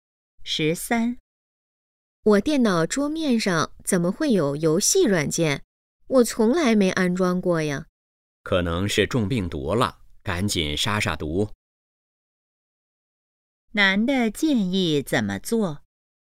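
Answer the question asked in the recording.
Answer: 赶紧杀毒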